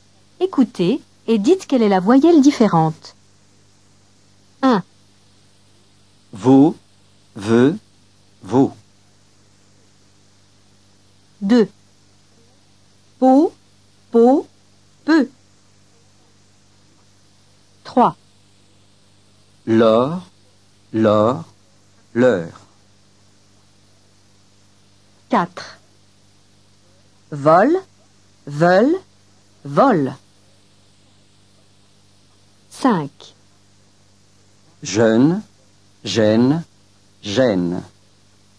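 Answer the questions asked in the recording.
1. la 2e : veut
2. la 3e : peu
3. la 3e : l'heure
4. la 2e : veulent
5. la 1re : jeune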